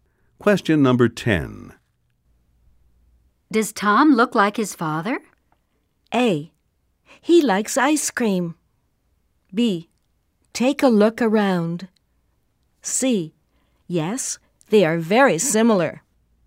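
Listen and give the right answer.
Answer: C: Yes, they are very similar.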